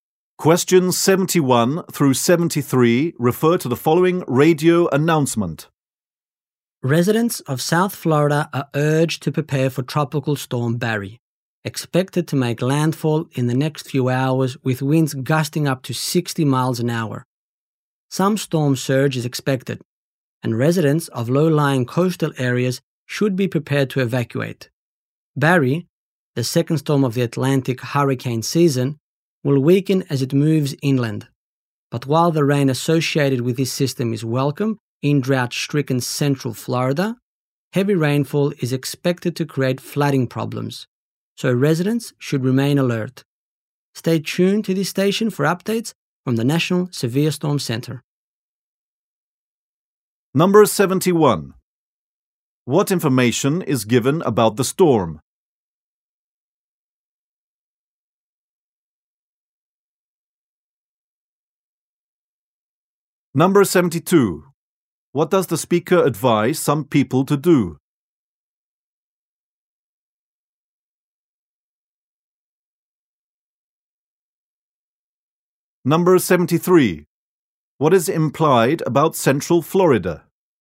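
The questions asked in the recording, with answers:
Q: What information is given about the storm?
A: It is expected to make landfall in South Florida within hours, with winds up to 60 miles an hour.

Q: What does the speaker advise some people to do?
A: Residents of low-lying coastal areas should be ready to evacuate.

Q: What is implied about Central Florida?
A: It has been suffering from drought and needs the rain.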